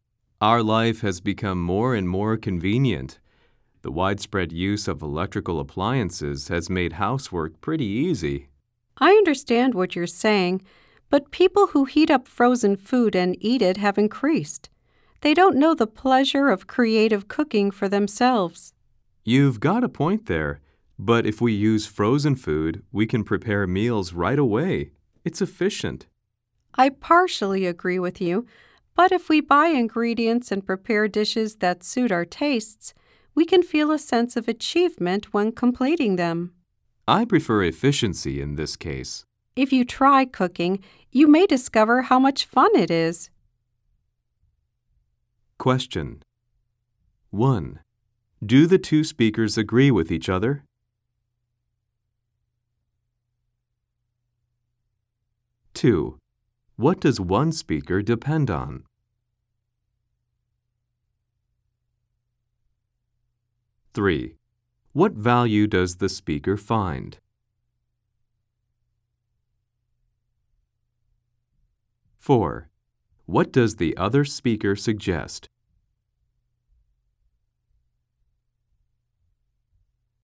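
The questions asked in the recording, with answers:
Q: Do the two speakers agree with each other?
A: No, they don't (they only partially agree).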